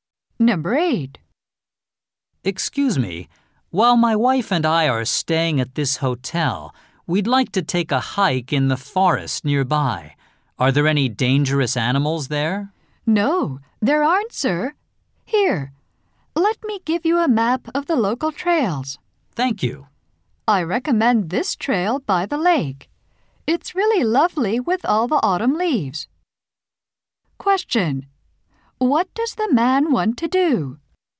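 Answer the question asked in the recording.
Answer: Go hiking in the forest nearby.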